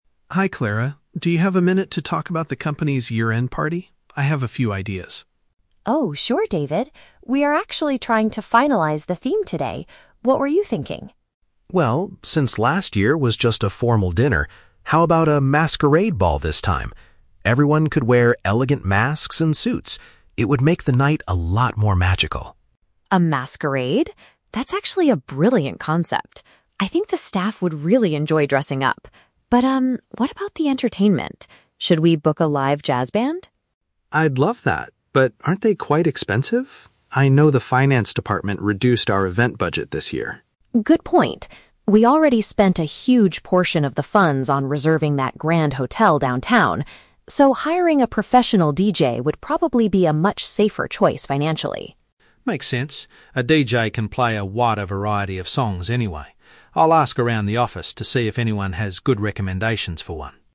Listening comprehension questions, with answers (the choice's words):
Listen to a conversation between an employee and an HR manager, and choose the correct answer (A, B, or C) for each question.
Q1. What kind of event does David suggest for this year's celebration?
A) A traditional and formal dinner.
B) A party where guests wear accessories to cover their faces.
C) A casual gathering at a local jazz club.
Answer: A party where guests wear accessories to cover their faces.

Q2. Why do they decide against hiring a live music group?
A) A large amount of the money has already been paid for the venue.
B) The finance department prefers listening to modern electronic music.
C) The employees do not enjoy dancing to live jazz performances.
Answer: A large amount of the money has already been paid for the venue.

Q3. What does David promise to do at the end of the conversation?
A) Speak to the finance department to request a bigger budget.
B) Order some elegant suits and masks for the management team.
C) Try to find a suitable person to play recorded music at the party.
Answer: Try to find a suitable person to play recorded music at the party.

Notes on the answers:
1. David suggests a "Masquerade Ball" where everyone wears "elegant masks." Option (B) uses paraphrasing ("accessories to cover their faces" = masks). Option (A) is a trap; a "formal dinner" is mentioned, but that was the theme for last year. Option (C) is also a trap; "jazz" is mentioned later, but they are not going to a club.
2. Clara says they cannot afford a band because they "spent a huge portion of the funds on reserving that grand hotel downtown." Option (A) perfectly paraphrases this ("money" = funds, "venue" = grand hotel). Option (B) is a trap; the "finance department" is mentioned as reducing the budget, but their music taste is never discussed. Option (C) is plausible but not mentioned in the audio.
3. David says he will "ask around the office to see if anyone has good recommendations" for a DJ. A DJ is someone who plays recorded music. Option (A) is a trap; he mentions the finance department, but he does not plan to ask them for money. Option (B) is a trap; he talks about masks and suits earlier, but he is not buying them for the team.

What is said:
David: Hi Clara, do you have a minute to talk about the company's Year-End Party? I have a few ideas.
Clara: Oh, sure David. We are actually trying to finalize the theme today. What were you thinking?
David: Well, since last year was just a formal dinner, how about a Masquerade Ball this time? Everyone could wear elegant masks and suits. It would make the night a lot more magical.
Clara: A masquerade? That's actually a brilliant concept. I think the staff would really enjoy dressing up. But um, what about the entertainment? Should we book a live jazz band?
David: I'd love that, but aren't they quite expensive? I know the finance department reduced our event budget this year.
Clara: Good point. We already spent a huge portion of the funds on reserving that grand hotel downtown. So, hiring a professional DJ would probably be a much safer choice financially.
David: Makes sense. A DJ can play a wider variety of songs anyway. I'll ask around the office to see if anyone has good recommendations for one.